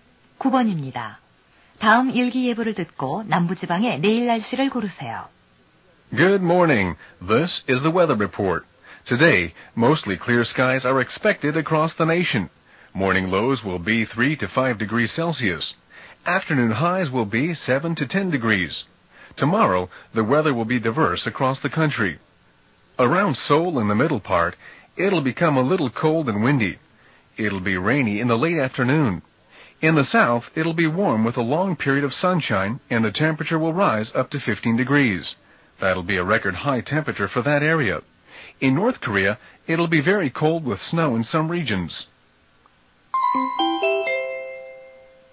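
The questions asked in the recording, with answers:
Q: 다음 일기 예보를 듣고 남부지방의 내일 날씨를 고르세요.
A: 따뜻하고 맑음 (최고 15도)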